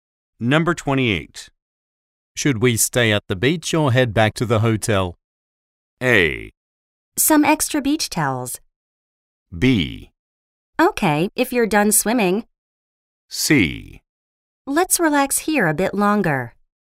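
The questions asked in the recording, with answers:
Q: Should we stay at the beach or head back to the hotel?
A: C: Let's relax here a bit longer.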